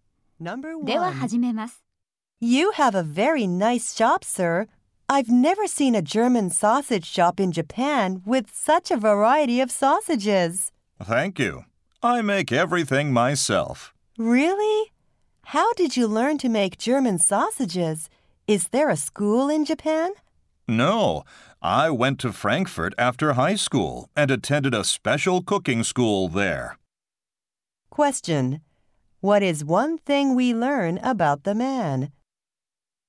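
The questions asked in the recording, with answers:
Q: What is one thing we learn about the man?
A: He studied at a cooking school in Frankfurt.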